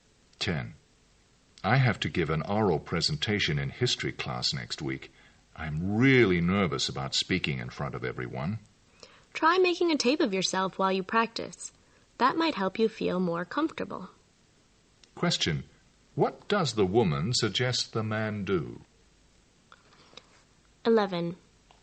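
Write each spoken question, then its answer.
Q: What does the woman suggest the man do?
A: Tape himself while practicing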